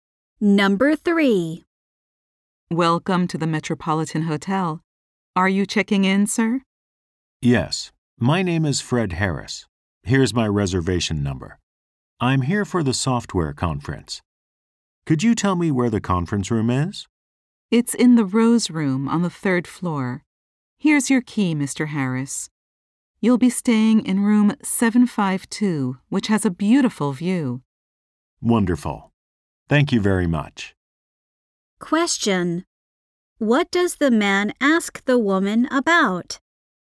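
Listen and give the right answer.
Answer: Where the conference room is.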